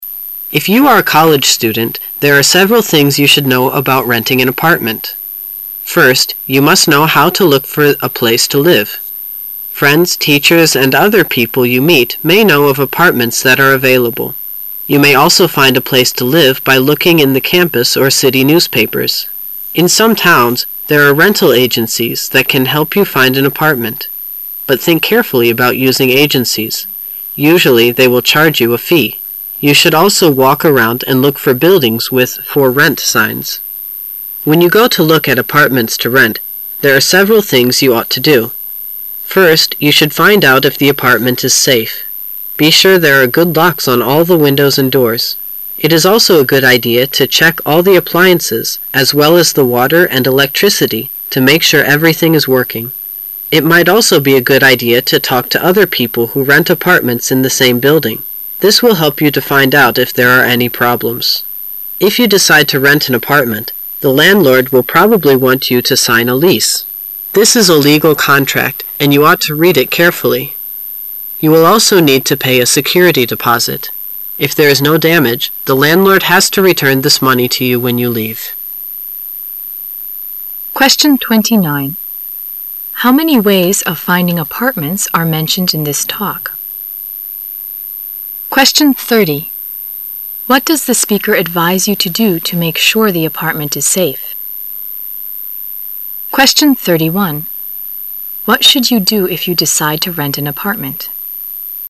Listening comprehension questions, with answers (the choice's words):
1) What does the speaker advise you to do to make sure the apartment is safe?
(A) Walk around the apartment for dangerous signs.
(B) Check the water and electricity to see if they are working.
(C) Make sure there are good locks on all the windows and doors.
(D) Talk to other people who rent apartments in the same building.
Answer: Make sure there are good locks on all the windows and doors.

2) What should you do if you decide to rent an apartmerit?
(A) Deposit some money in a bank.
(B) Sign the lease as soon as possible.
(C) Ask the landlord for a damage deposit.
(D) Read the contract carefully and pay a security deposit.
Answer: Read the contract carefully and pay a security deposit.

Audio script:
[解析] 29-31 If you are a college student, there are several things you should know about renting an apartment. First, you must know how to look for a place to live. Friends, teachers, and other people you meet may know of apartments that are available. You may also find a place to live by looking in the campus or city newspapers. In some towns, there are rental agencies that can help you find an apartment, but think carefully about using agencies. Usually they will charge you a fee. You should also walk around and look for buildings with For Rent signs. When you go to look at apartments to rent, there are several things you ought to do. First, you should find out if the apartment is safe. Be sure there are good locks on all the windows and doors. It is also a good idea to check all the appliances as well as the water and electricity to be sure everything is working. It might also be a good idea to talk to other people who rent apartments in the same building. This will help you to find out if there are any problems. If you decide to rent an apartment, the landlord will probably want you to sign a lease. This is a legal contract, and you ought to read it carefully. You will also need to pay a security deposit. If there is no damage, the landlord has to return this money to you when you leave. 29.How many ways of finding apartments are mentioned in this talk?